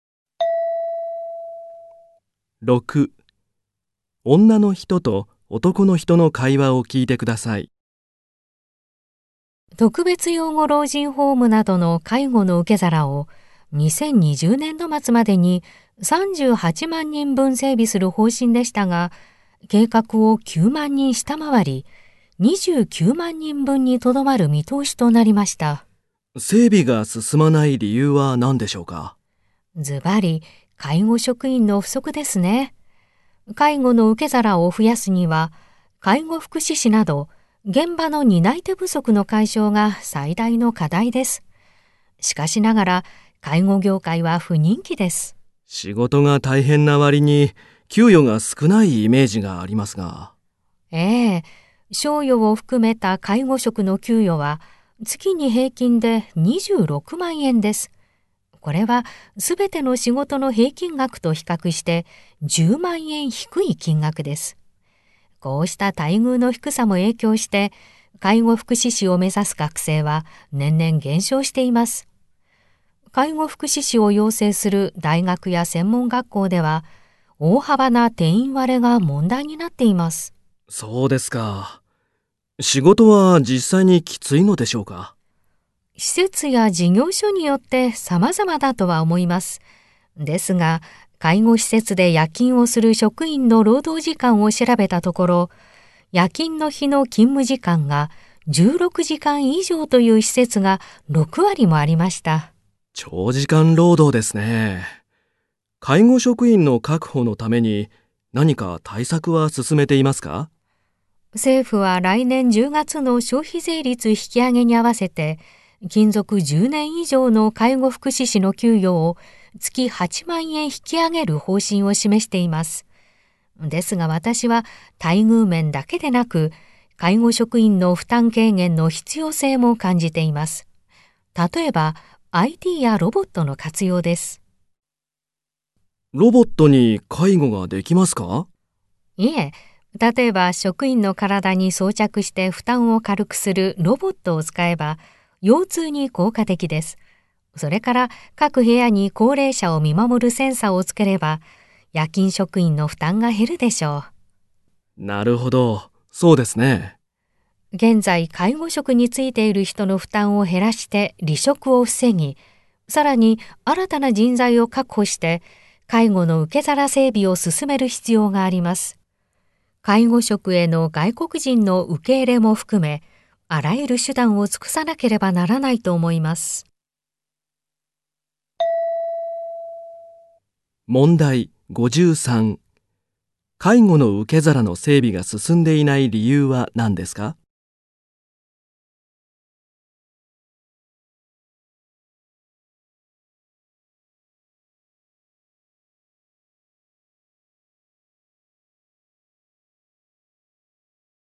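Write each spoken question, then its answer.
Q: 介護の受け皿の整備が進んでいない理由は何ですか?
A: 介護職員の不足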